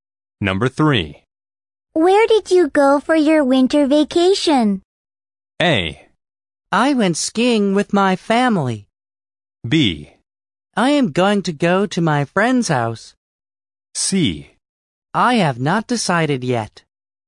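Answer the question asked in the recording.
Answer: A: I went skiing with my family.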